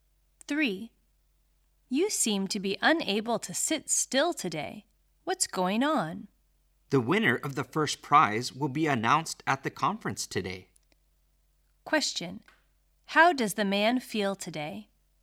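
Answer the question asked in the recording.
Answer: Nervous/anxious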